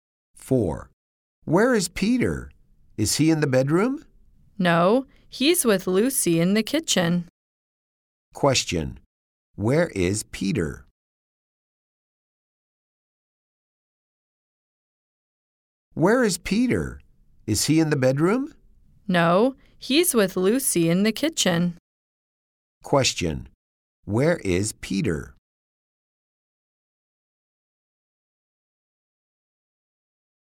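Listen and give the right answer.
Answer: In the kitchen with Lucy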